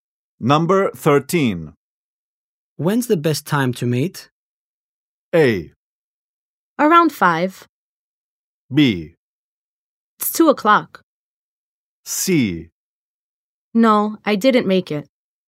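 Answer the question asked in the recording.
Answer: A: Around 5.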